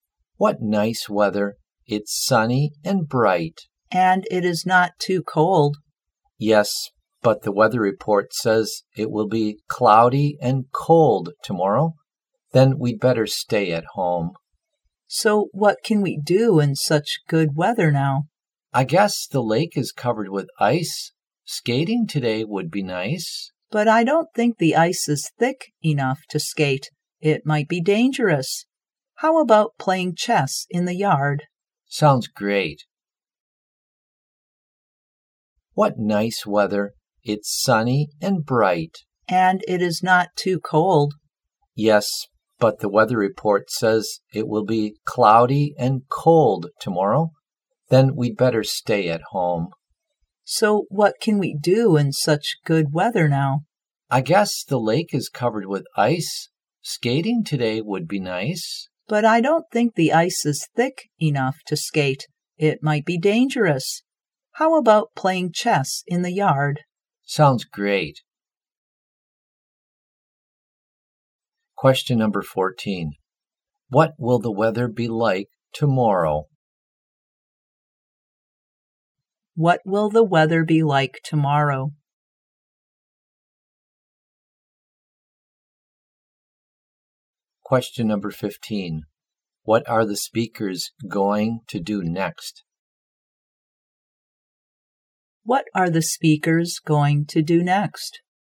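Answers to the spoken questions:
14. Cloudy and cold
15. Play chess in the yard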